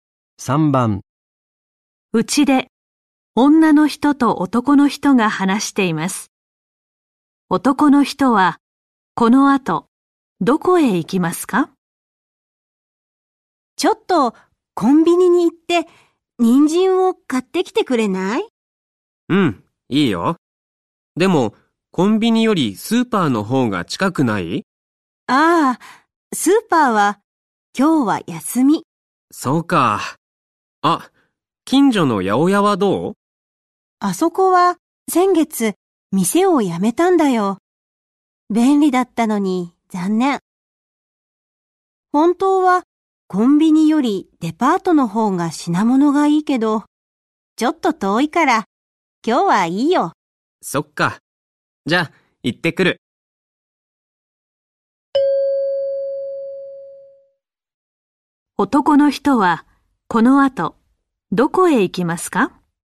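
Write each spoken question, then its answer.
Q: 男の人はこの後どこへ行きますか?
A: コンビニ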